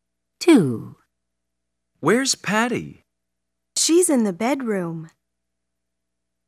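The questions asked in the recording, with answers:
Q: Where's Patty?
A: In the bedroom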